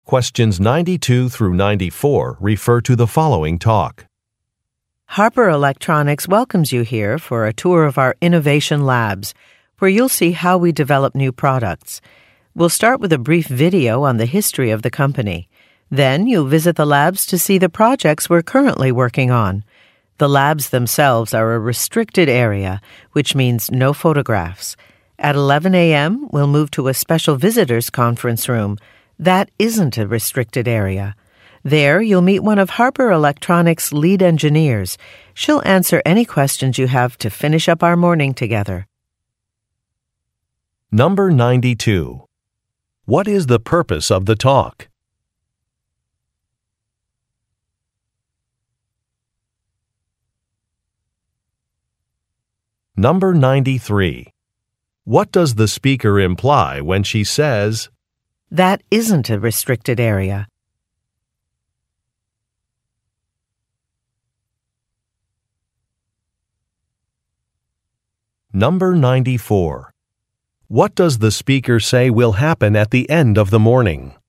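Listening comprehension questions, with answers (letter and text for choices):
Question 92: What is the purpose of the talk?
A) To introduce a tour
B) To announce a new procedure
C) To describe a new product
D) To welcome an employee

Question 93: What does the speaker imply when she says, "That isn't a restricted area"?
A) Listeners will not need a badge.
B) Listeners may take pictures.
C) Security staff are not on duty.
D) Product samples will be provided.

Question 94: What does the speaker say will happen at the end of the morning?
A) Refreshments will be provided.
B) Guests will visit a company gift shop.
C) There will be a discussion with an employee.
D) Surveys will be distributed.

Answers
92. A) To introduce a tour
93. B) Listeners may take pictures.
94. C) There will be a discussion with an employee.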